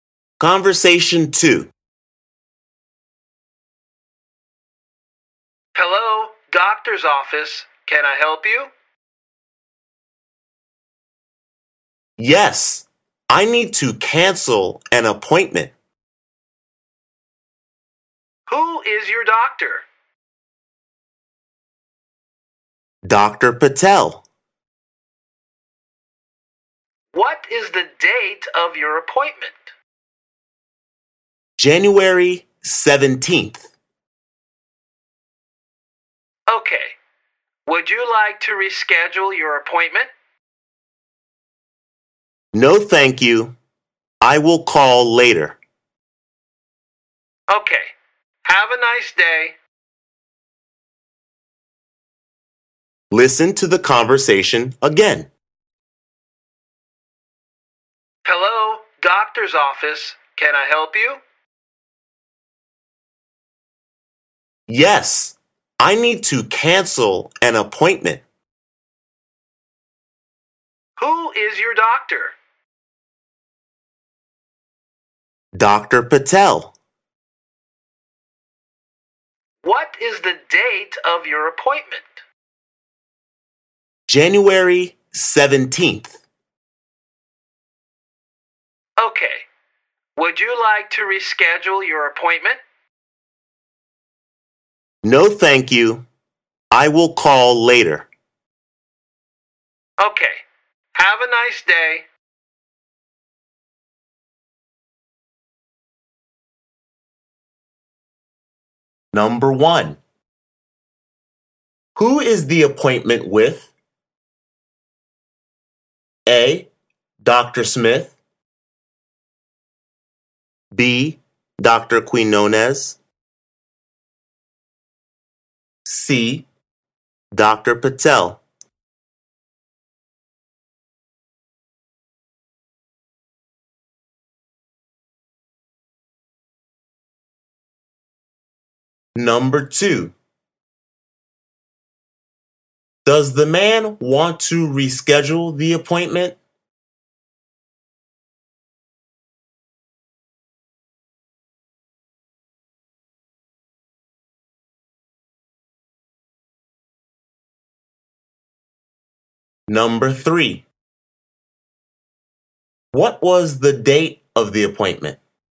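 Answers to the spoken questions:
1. C: Dr. Patel
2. No
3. January 17th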